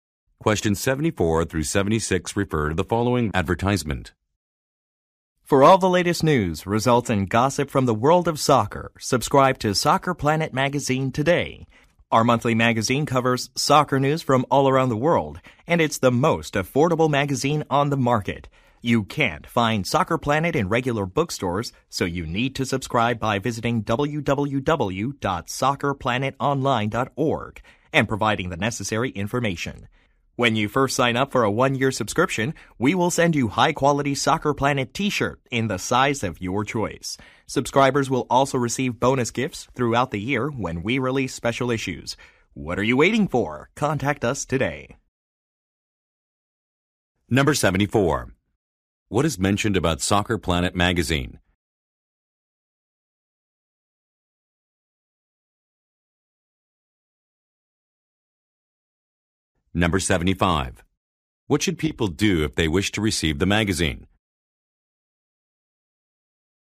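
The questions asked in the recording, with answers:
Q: What should people do if they wish to receive the magazine?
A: Subscribe on the website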